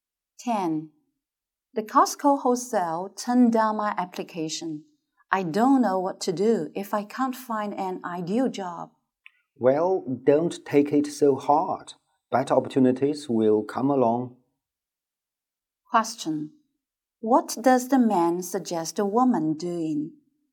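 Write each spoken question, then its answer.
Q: What does the man suggest a woman doing?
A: Not taking it so hard and waiting for better opportunities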